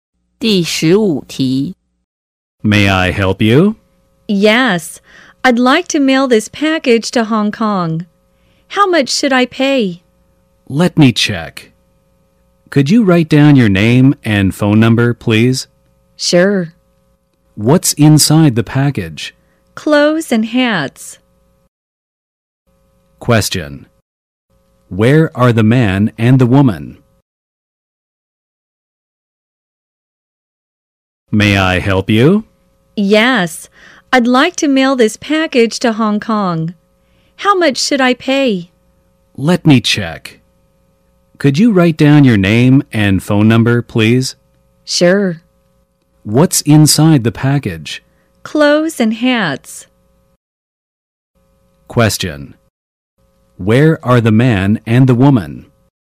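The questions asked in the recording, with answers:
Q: Where are the man and the woman?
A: At a post office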